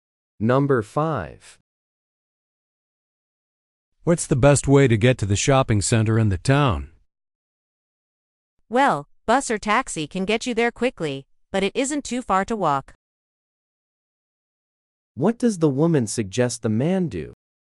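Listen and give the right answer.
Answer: Walk to the shopping center.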